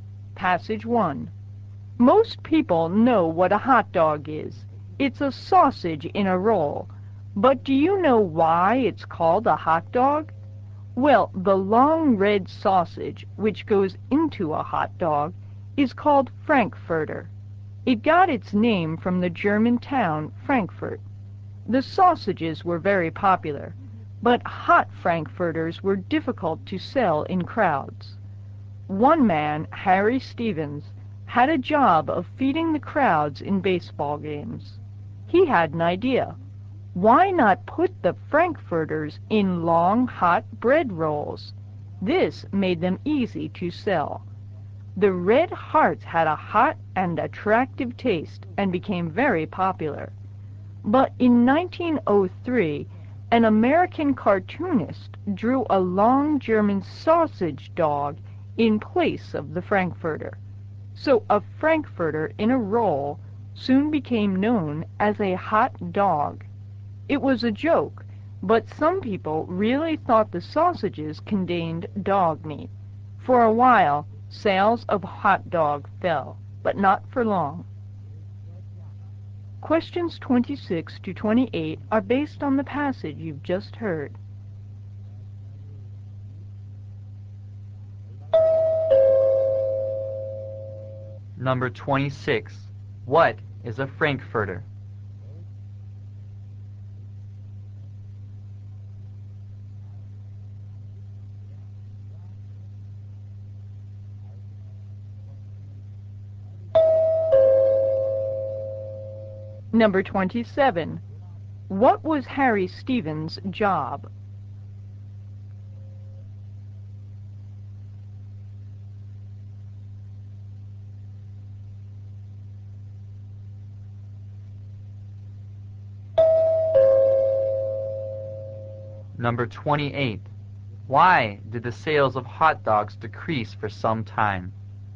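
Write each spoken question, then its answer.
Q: What is a Frankfurter?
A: A long red sausage

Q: What was Harry Stevens' job?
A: Feeding the crowds at baseball games

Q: Why did the sales of hot dogs decrease for some time?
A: Some people thought they contained dog meat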